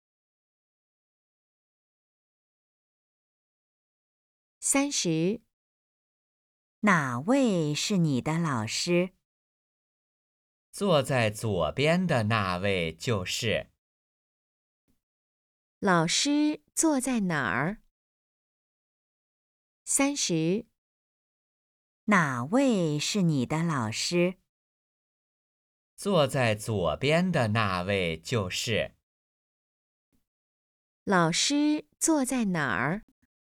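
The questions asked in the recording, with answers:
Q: 老师坐在哪儿?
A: 左边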